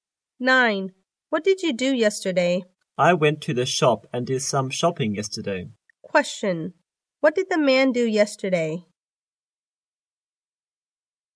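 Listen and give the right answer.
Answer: He went to the shop and did some shopping.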